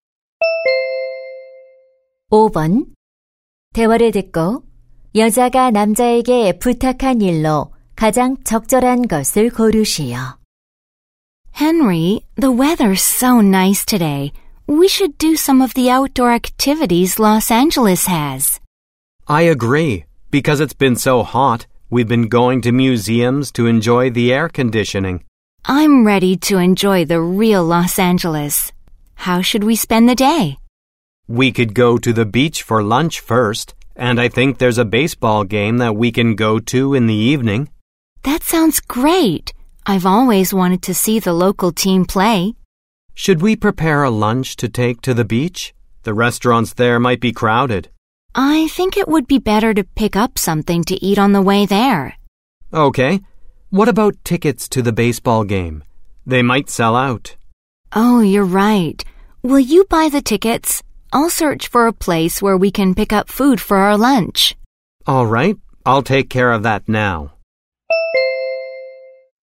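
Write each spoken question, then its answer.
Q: 대화를 듣고 여자가 남자에게 부탁한 일로 가장 적절한 것을 고르시오.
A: 야구 경기 티켓 구매하기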